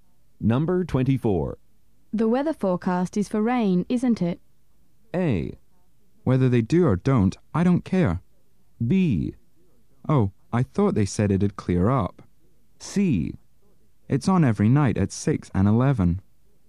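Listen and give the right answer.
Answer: B: Oh, I thought they said it'd clear up.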